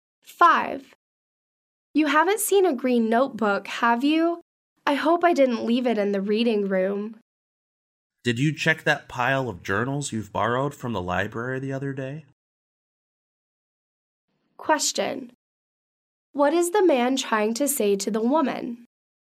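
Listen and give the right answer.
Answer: The notebook may be in the pile of library journals she borrowed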